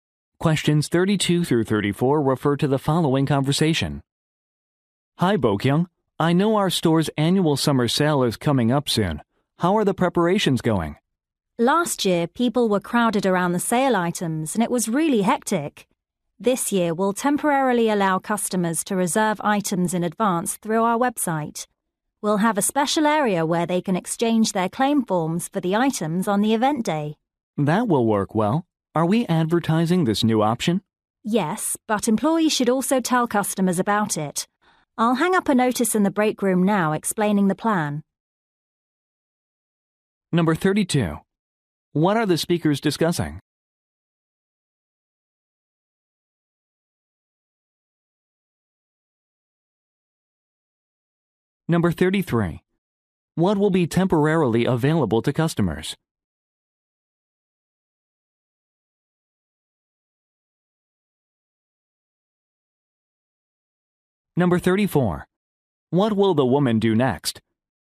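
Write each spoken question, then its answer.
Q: What are the speakers discussing?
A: The store's annual summer sale

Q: What will be temporarily available to customers?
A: Reserving items in advance on the website

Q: What will the woman do next?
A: Hang up a notice in the break room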